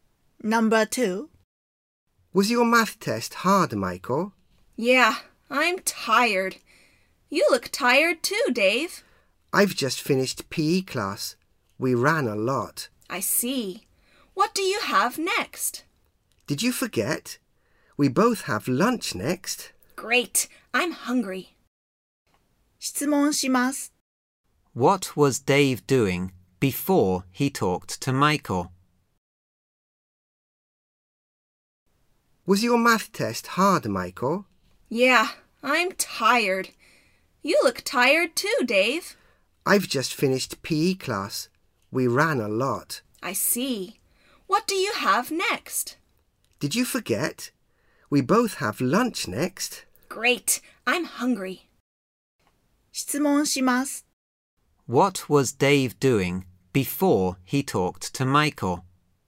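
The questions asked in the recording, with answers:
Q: What was Dave doing before he talked to Michael?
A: He was running in PE class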